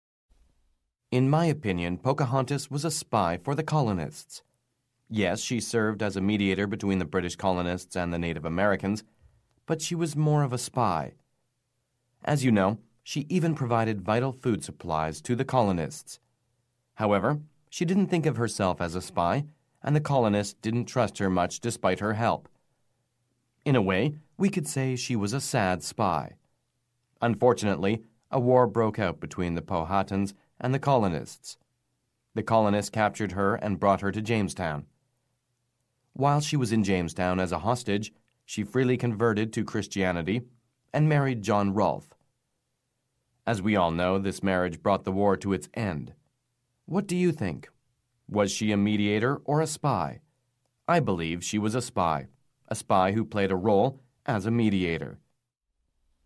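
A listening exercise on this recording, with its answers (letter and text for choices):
Sample: Listen to the recording and answer the multiple-choice question by selecting the correct response. Only one response is correct.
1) What did the marriage between Pocahontas and John Rolfe do to the war between the British colony and the Native Americans?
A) She married to spy on the Native Americans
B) The marriage was a mediator for her job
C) The marriage started the war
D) The marriage ended the war.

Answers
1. D) The marriage ended the war.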